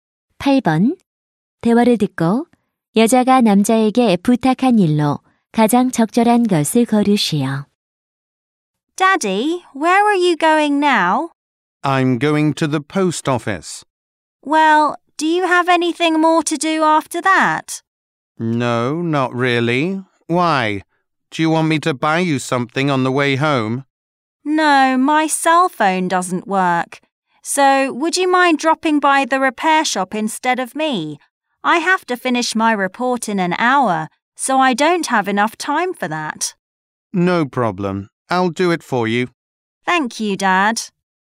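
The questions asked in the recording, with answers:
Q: 대화를 듣고 여자가 남자에게 부탁한 일로 가장 적절한 것을 고르시오.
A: 휴대폰 수리점에 대신 들르기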